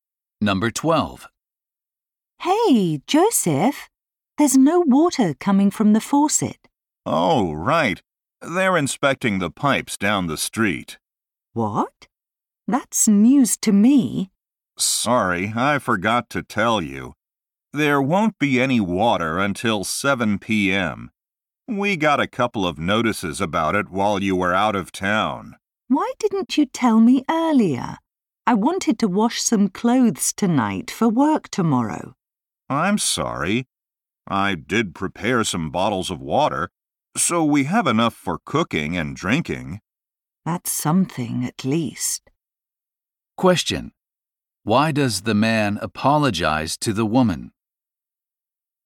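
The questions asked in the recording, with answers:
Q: Why does the man apologize to the woman?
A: He forgot to tell her the water would be shut off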